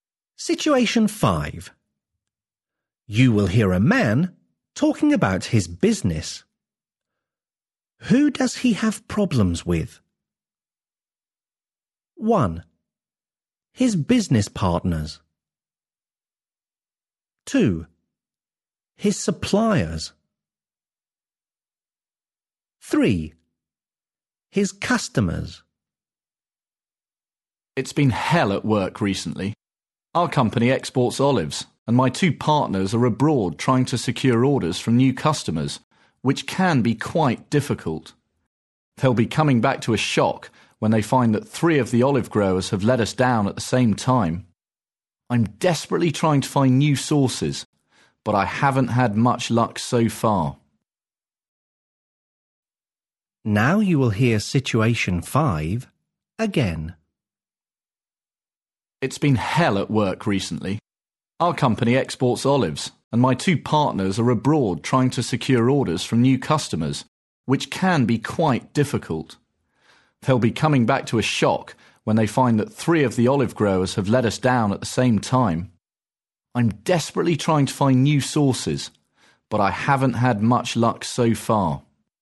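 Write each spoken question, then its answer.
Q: Who does he have problems with?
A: 2: His suppliers.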